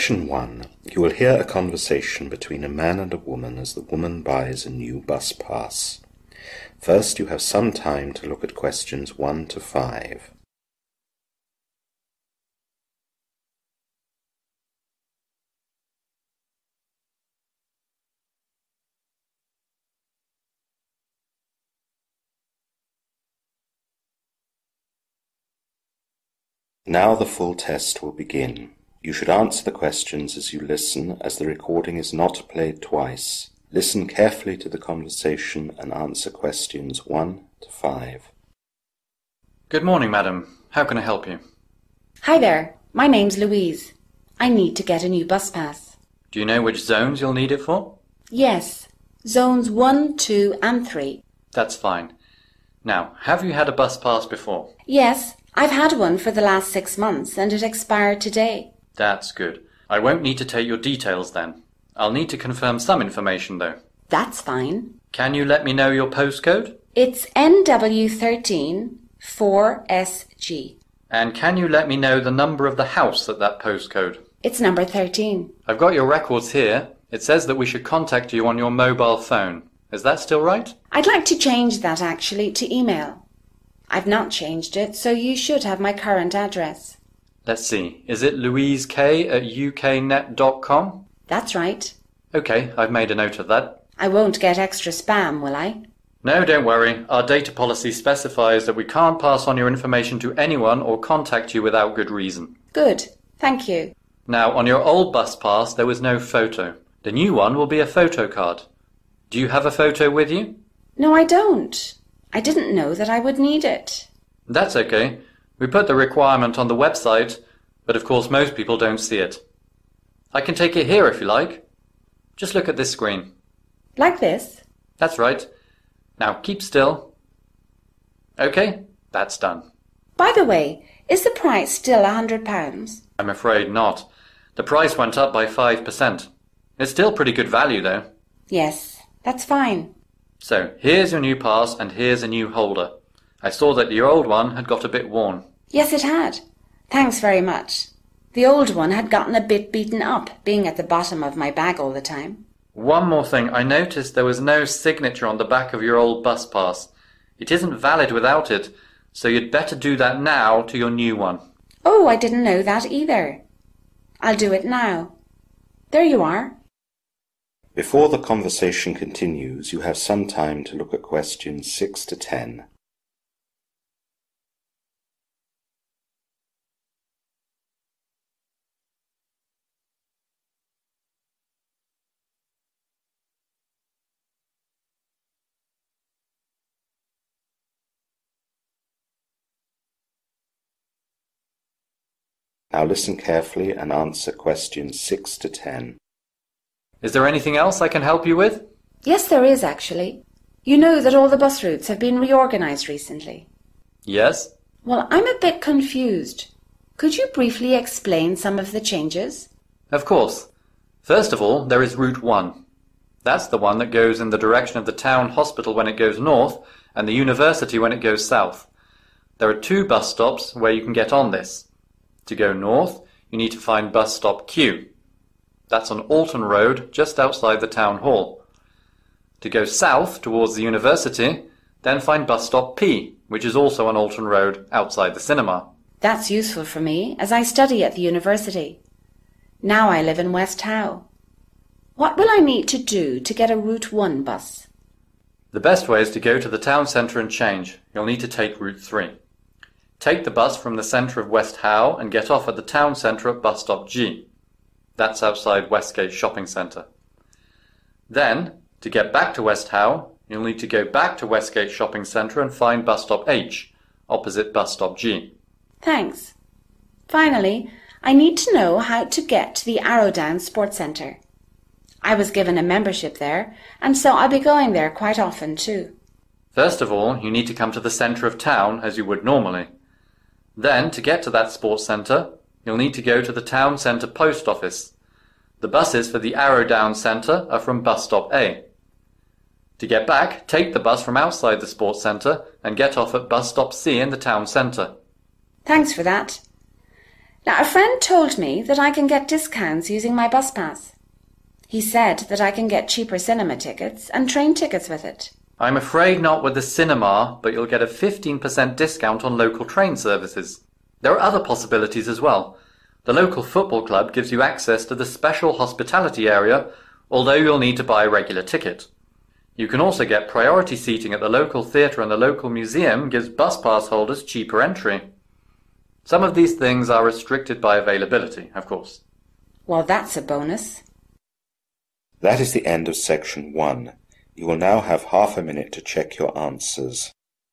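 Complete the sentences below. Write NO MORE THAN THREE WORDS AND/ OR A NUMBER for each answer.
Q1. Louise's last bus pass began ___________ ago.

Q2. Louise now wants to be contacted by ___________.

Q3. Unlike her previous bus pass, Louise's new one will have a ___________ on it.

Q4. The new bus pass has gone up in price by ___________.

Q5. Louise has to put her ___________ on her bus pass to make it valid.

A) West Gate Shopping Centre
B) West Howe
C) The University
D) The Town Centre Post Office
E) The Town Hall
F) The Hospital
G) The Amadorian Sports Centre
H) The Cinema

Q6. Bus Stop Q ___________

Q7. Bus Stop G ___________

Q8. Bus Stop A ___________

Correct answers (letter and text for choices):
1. 6 months
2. email
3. photo
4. 5%
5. signature
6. E) The Town Hall
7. A) West Gate Shopping Centre
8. D) The Town Centre Post Office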